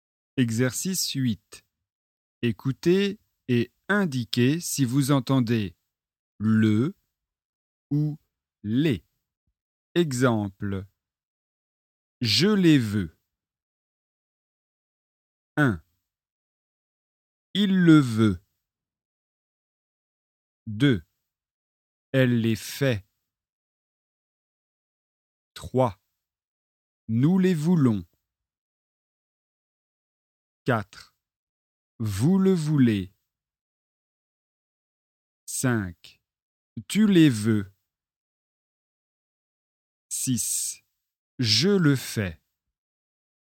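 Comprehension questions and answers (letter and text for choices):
Exercice 8 : écoutez et indiquez si vous entendez LE ou LES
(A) LE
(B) LES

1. Il le veut.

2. Elle les fait.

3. Nous les voulons.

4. Vous le voulez.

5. Tu les veux.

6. Je le fais.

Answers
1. (A) LE
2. (B) LES
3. (B) LES
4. (A) LE
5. (B) LES
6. (A) LE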